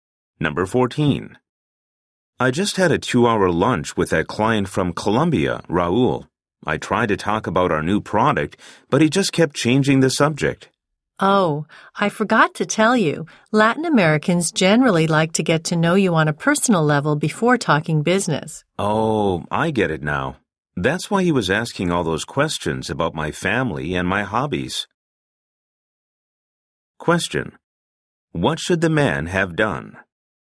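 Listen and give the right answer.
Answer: Gotten to know the client personally before talking business.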